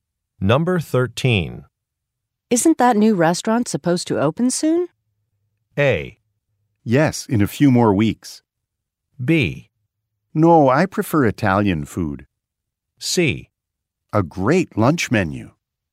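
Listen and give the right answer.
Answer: A: Yes, in a few more weeks.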